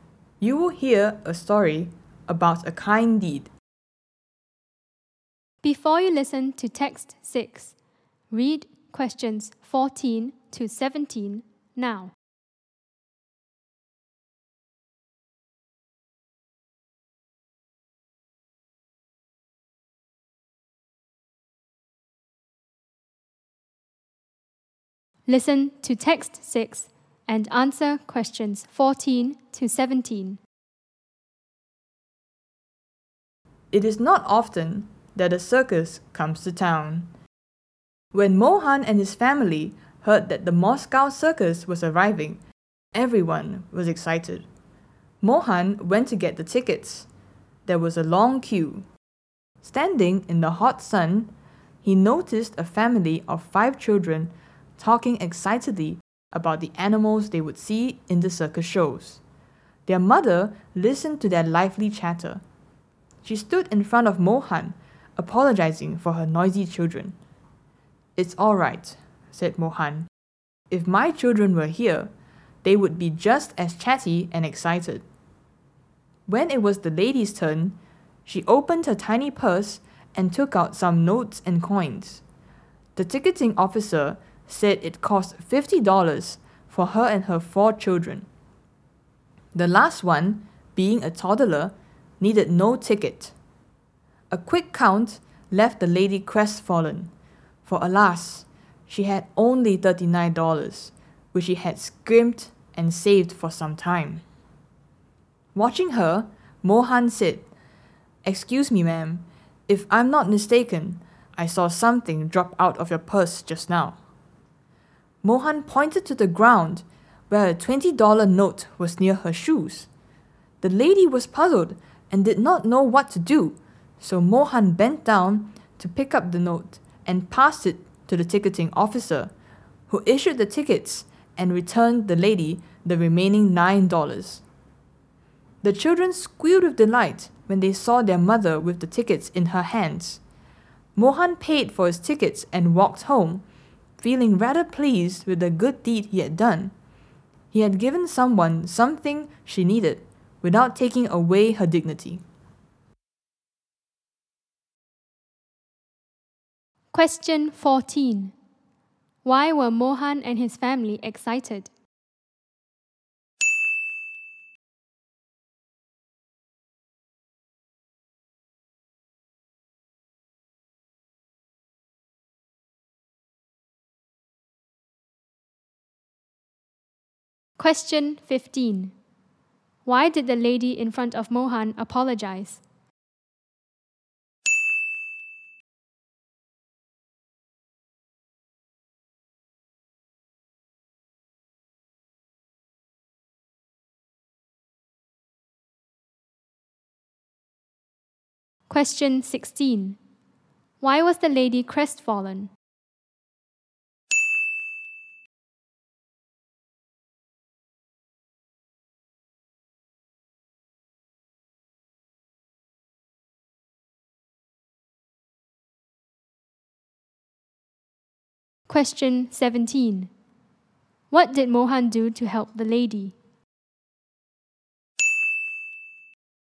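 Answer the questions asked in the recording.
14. The Moscow circus was coming to town.
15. Her children were noisy.
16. She had only $39, not enough for the $50 tickets.
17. He pretended she had dropped a $20 note and gave it to the ticketing officer for her.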